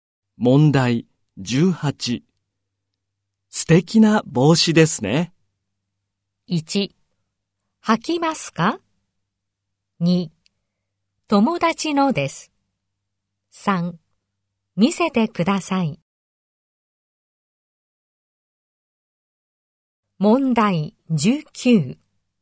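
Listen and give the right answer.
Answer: 2: 友達のです。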